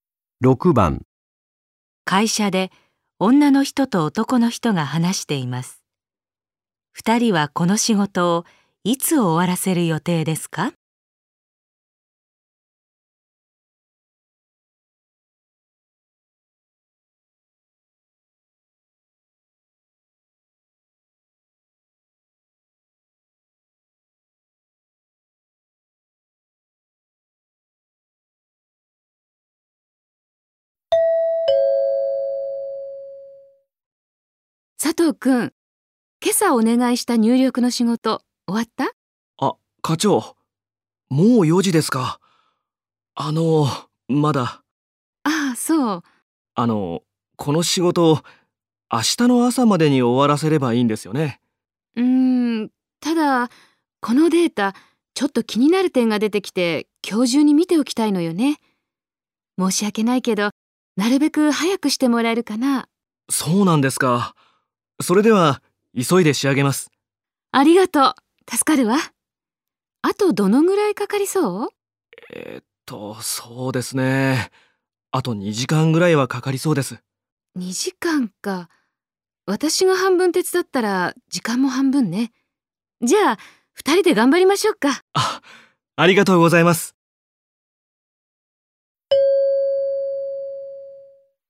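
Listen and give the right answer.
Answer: 今日の5時ごろ(あと1時間後)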